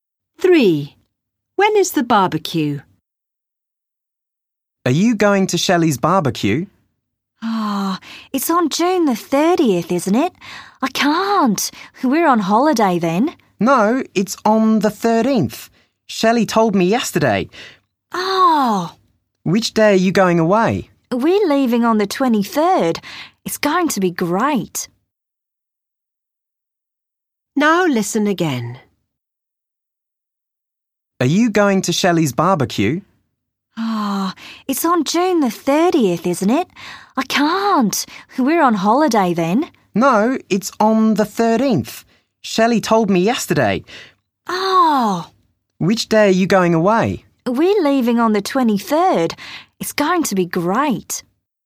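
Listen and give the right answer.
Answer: June the 13th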